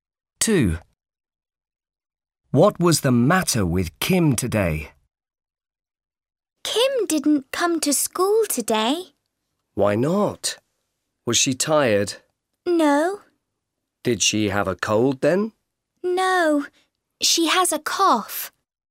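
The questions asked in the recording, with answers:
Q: What was the matter with Kim today?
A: She has a cough.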